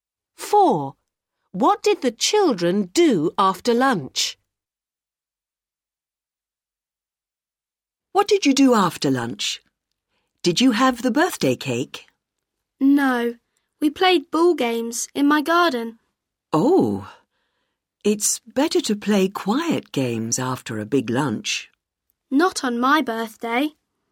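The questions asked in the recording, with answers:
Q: What did the children do after lunch?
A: played ball games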